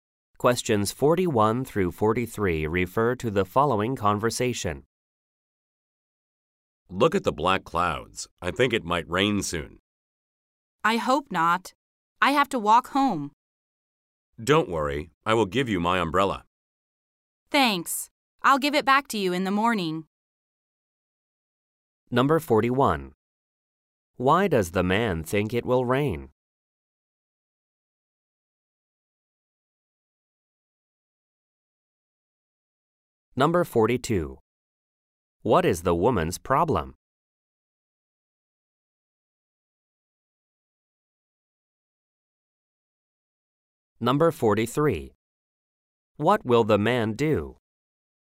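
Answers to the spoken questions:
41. There are black clouds
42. She has to walk home
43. Give her his umbrella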